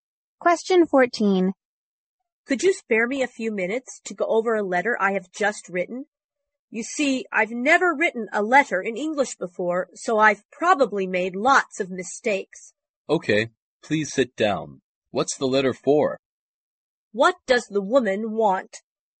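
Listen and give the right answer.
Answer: Him to check her English letter for mistakes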